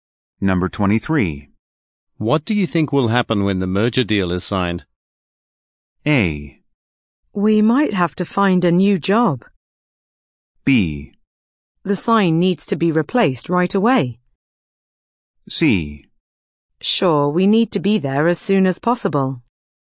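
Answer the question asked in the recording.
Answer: A: We might have to find a new job.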